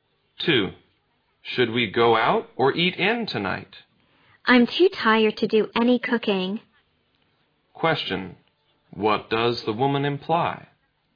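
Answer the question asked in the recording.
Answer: She wants to go out to eat.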